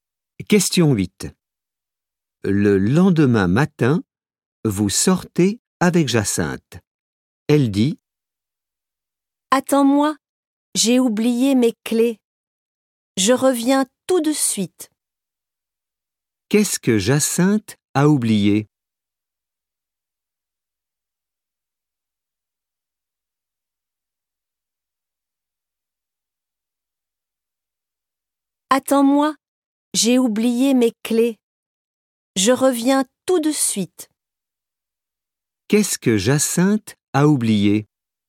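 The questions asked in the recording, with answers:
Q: Qu'est-ce que Jacinthe a oublié?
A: ses clés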